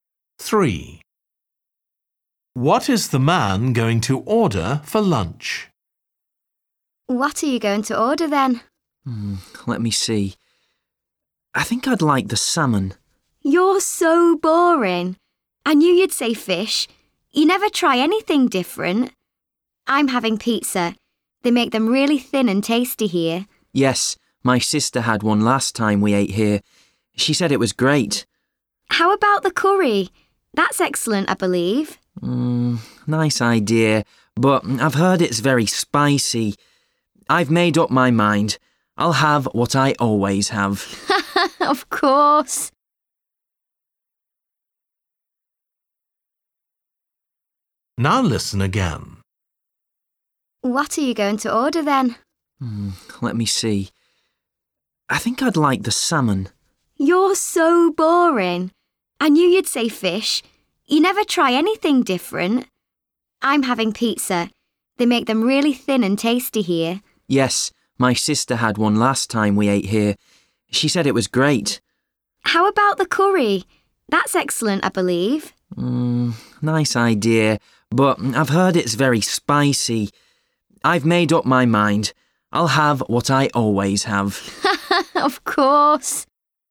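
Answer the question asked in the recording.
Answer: Salmon (fish)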